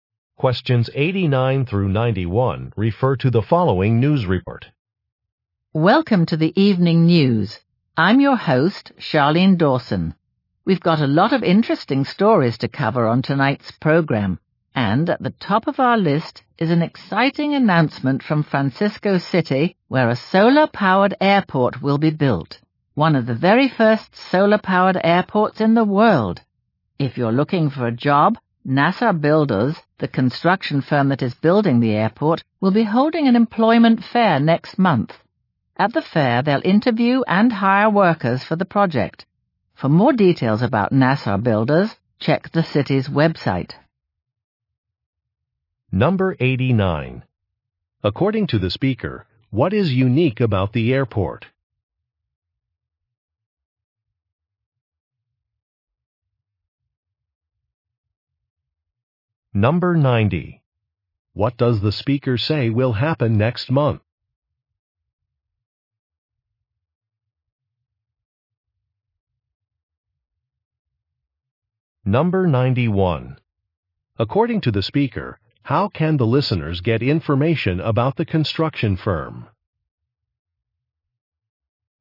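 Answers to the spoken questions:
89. It will be solar-powered
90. An employment fair
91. Check the city's website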